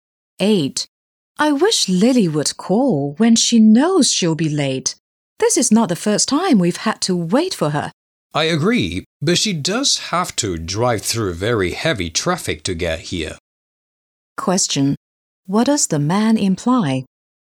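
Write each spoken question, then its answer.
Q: What does the man imply?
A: Lily's lateness is understandable because of heavy traffic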